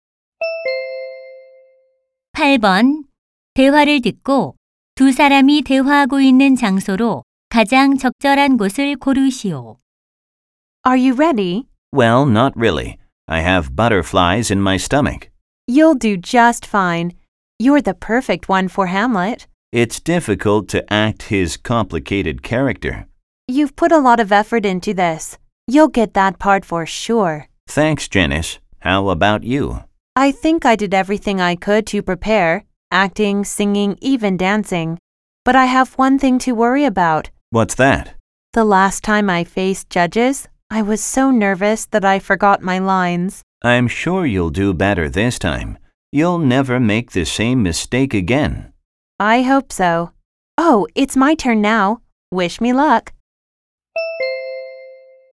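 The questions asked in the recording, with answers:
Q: 대화를 듣고 두 사람이 대화하고 있는 장소로 가장 적절한 곳을 고르시오.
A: 연극 오디션장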